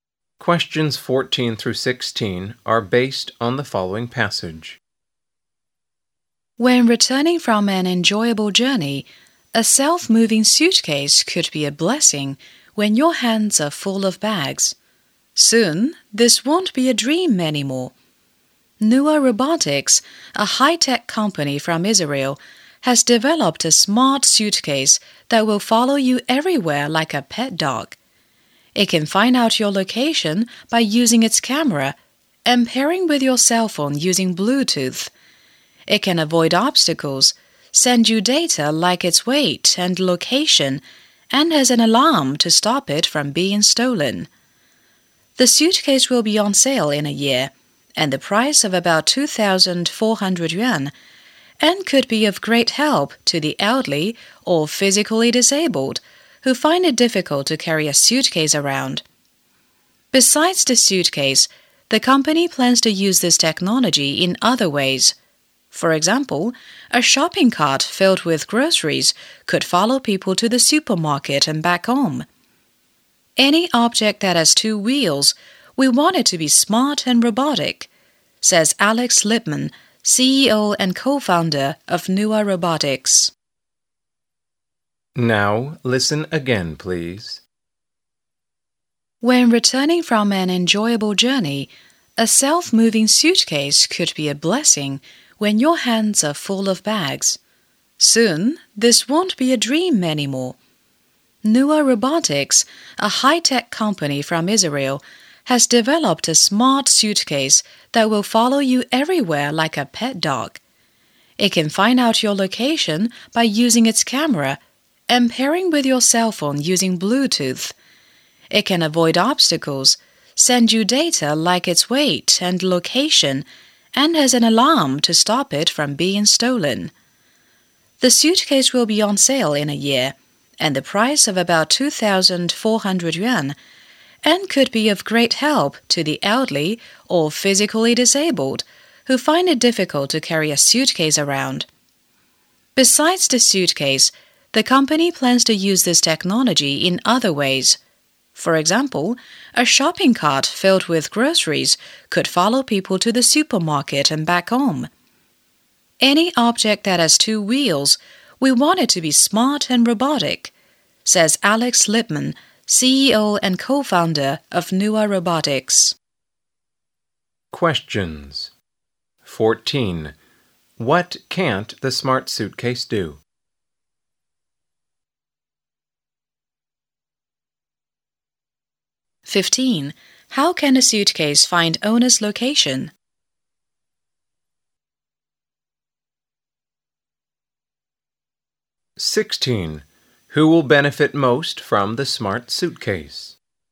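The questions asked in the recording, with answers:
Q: How can a suitcase find owner's location?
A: By using its camera and pairing with the owner's cell phone via Bluetooth

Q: Who will benefit most from the smart suitcase?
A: The elderly or physically disabled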